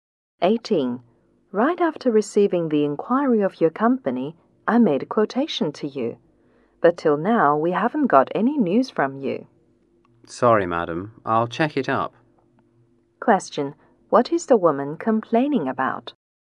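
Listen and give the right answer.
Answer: She hasn't heard back about the quotation she sent.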